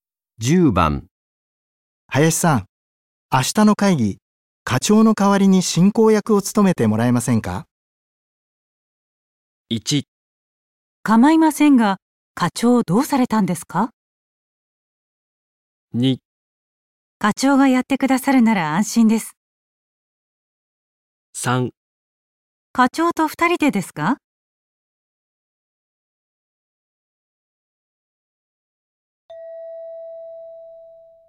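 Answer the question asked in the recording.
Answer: 1: 構いませんが、課長どうされたんですか?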